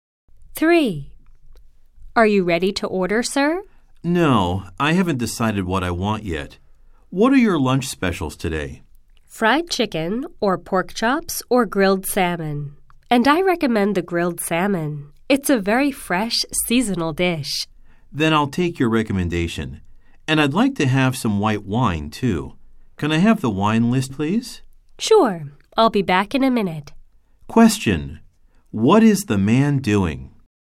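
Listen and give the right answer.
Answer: Ordering lunch at a restaurant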